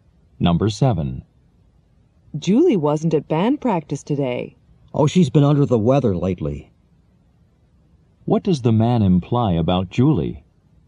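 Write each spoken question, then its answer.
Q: What does the man imply about Julie?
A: She has been sick lately.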